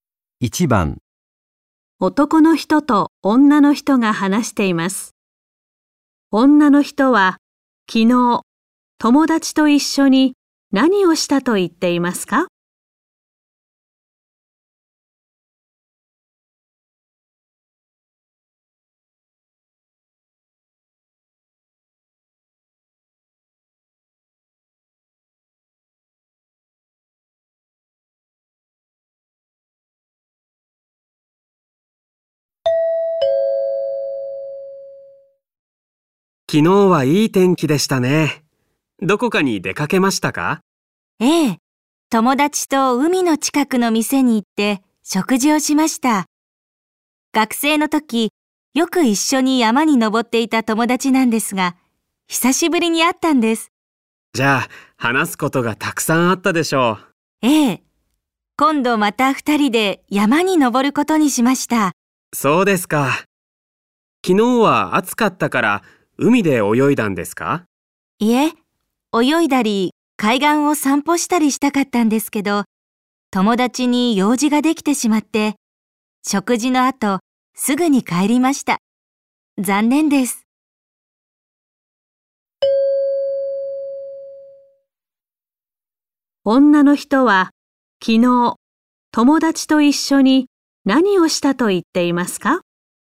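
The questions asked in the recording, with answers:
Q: 女の人は昨日友達と一緒に何をしたと言っていますか?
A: 海の近くの店で食事をした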